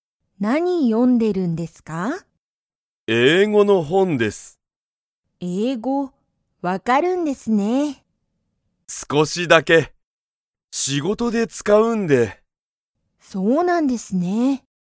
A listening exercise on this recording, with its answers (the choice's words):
木村きむらさんは、____英語えいごが分わかる。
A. 今日きょうは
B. この後あと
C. この前まえ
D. 少すこしだけ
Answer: 少すこしだけ

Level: Level 1